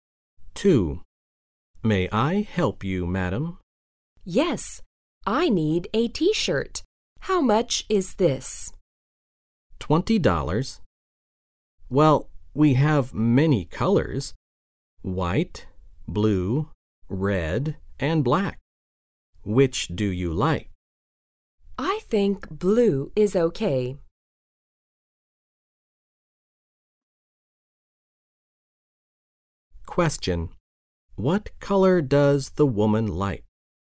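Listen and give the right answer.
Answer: Blue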